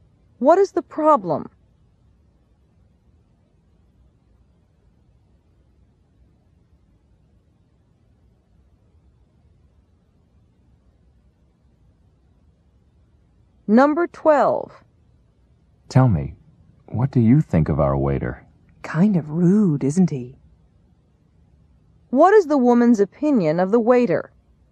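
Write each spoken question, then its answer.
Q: What is the woman's opinion of the waiter?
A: She thinks he is rude.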